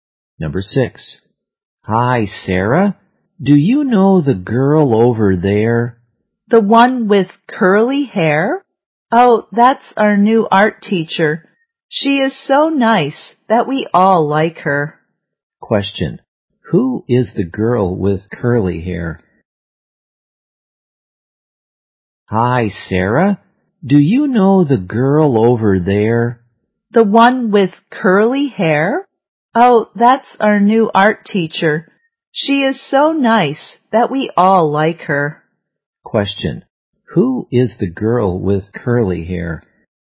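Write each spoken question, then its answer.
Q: Who is the girl with curly hair?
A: Their new art teacher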